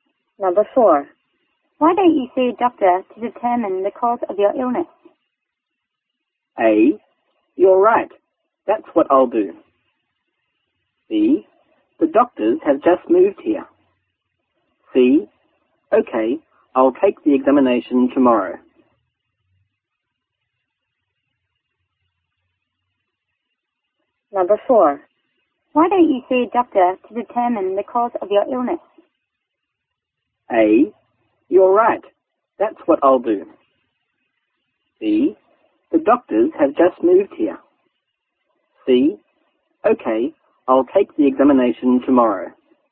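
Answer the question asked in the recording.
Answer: A: You're right. That's what I'll do.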